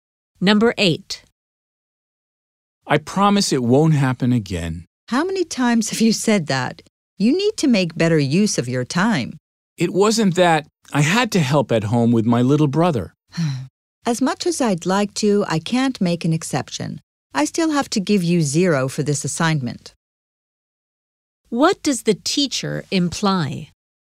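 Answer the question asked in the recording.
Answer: The student will get 0 for the assignment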